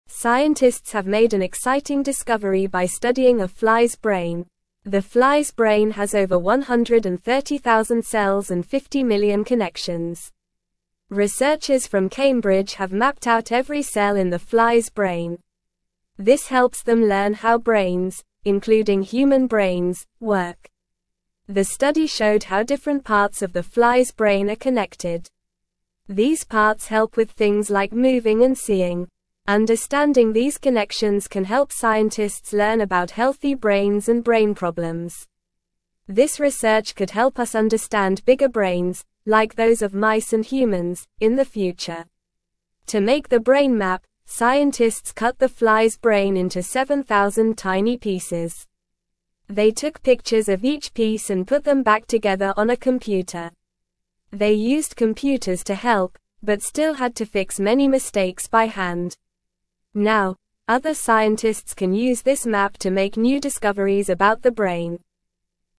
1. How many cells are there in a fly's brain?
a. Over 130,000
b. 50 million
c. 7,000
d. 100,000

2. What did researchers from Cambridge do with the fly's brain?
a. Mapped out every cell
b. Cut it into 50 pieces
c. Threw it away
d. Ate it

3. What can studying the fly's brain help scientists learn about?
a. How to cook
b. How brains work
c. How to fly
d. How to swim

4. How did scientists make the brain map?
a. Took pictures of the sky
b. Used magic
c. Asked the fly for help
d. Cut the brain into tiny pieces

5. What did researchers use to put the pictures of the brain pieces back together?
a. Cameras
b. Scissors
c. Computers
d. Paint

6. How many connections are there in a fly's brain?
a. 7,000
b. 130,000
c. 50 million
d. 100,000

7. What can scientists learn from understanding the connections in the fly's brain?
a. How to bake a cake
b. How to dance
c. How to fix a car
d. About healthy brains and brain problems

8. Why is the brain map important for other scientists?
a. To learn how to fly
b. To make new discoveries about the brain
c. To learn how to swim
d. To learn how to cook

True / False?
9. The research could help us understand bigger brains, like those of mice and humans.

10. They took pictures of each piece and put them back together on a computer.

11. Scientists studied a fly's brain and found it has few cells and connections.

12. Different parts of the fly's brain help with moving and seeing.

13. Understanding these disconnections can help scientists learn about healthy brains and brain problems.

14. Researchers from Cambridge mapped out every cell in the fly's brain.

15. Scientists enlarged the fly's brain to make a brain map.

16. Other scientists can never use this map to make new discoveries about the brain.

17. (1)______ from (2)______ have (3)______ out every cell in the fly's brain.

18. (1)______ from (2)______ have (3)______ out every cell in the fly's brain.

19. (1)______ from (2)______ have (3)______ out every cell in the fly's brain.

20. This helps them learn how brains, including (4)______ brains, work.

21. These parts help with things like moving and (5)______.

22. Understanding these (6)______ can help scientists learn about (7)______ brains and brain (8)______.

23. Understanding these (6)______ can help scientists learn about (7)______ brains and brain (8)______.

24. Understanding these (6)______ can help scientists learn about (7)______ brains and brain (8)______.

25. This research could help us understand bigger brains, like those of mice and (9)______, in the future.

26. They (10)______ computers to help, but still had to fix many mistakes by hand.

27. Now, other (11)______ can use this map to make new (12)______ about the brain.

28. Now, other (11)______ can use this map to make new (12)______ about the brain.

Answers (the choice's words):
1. Over 130,000
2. Mapped out every cell
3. How brains work
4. Cut the brain into tiny pieces
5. Computers
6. 50 million
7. About healthy brains and brain problems
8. To make new discoveries about the brain
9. True
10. True
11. False
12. True
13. False
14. True
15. False
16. False
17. Researchers
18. Cambridge
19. mapped
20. human
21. seeing
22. connections
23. healthy
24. problems
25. humans
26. used
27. scientists
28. discoveries

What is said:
Scientists have made an exciting discovery by studying a fly's brain. The fly's brain has over 130,000 cells and 50 million connections. Researchers from Cambridge have mapped out every cell in the fly's brain. This helps them learn how brains, including human brains, work.
The study showed how different parts of the fly's brain are connected. These parts help with things like moving and seeing. Understanding these connections can help scientists learn about healthy brains and brain problems. This research could help us understand bigger brains, like those of mice and humans, in the future.
To make the brain map, scientists cut the fly's brain into 7,000 tiny pieces. They used computers to help, but still had to fix many mistakes by hand. Now, other scientists can use this map to make new discoveries about the brain.

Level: Level 2